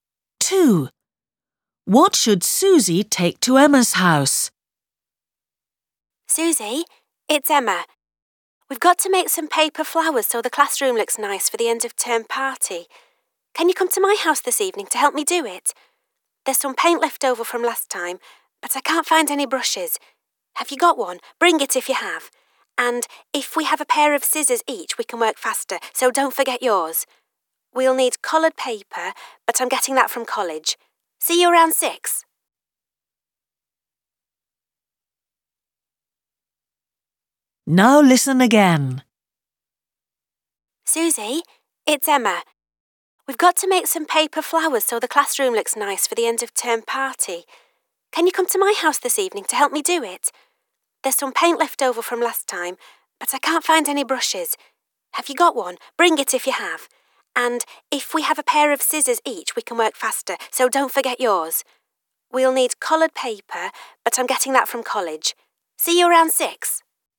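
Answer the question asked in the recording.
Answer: A paintbrush and scissors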